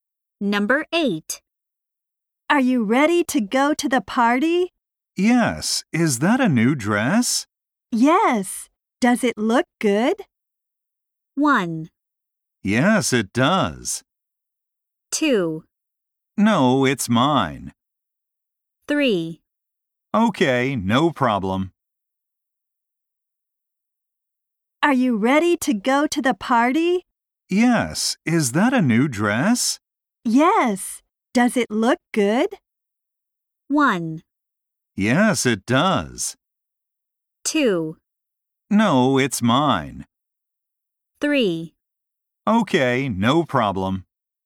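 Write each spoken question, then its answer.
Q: Yes. Does it look good?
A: 1: Yes, it does.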